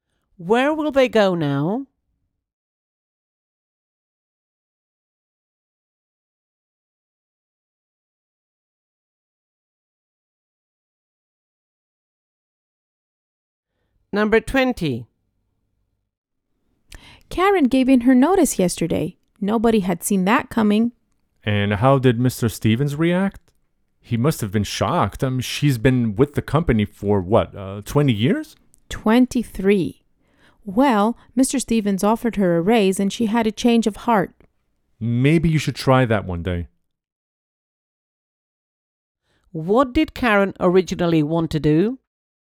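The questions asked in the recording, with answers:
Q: What did Karen originally want to do?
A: Quit her job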